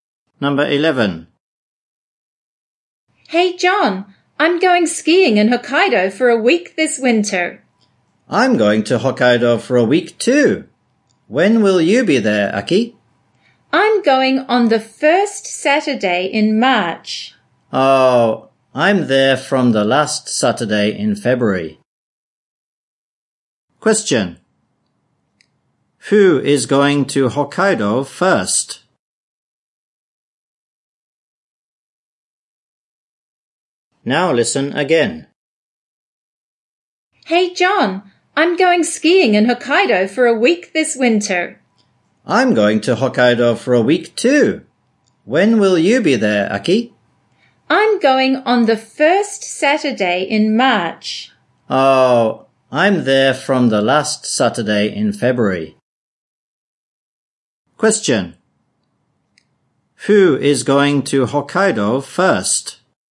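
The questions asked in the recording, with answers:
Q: Who is going to Hokkaido first?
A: John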